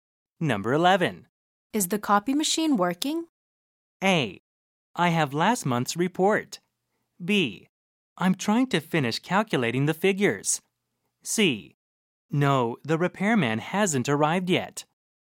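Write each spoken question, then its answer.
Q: Is the copy machine working?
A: C: No, the repairman hasn't arrived yet.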